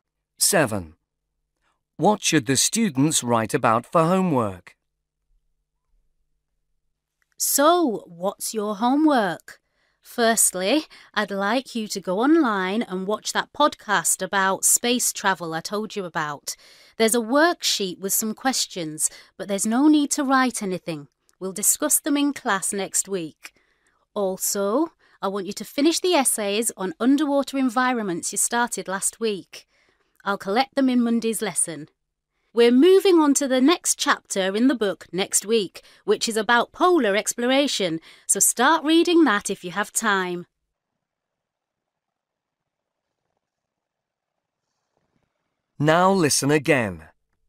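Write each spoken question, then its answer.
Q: What should the students write about for homework?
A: Underwater environments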